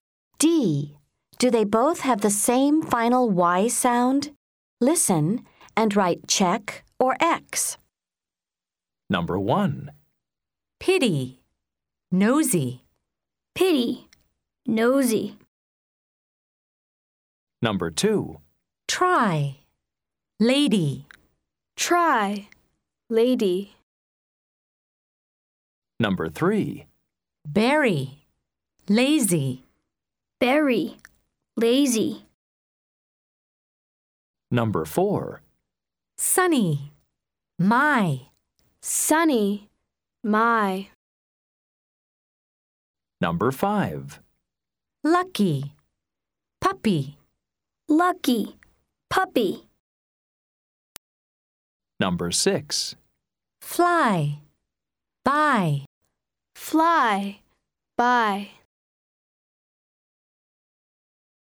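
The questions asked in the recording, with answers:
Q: Do they both have the same final Y sound?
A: Yes (check)

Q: Do they both have the same final Y sound?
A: No (X)

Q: Do they both have the same final Y sound?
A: Yes (check)

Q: Do they both have the same final Y sound?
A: No (X)

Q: Do they both have the same final Y sound?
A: Yes (check)

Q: Do they both have the same final Y sound?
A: Yes (check)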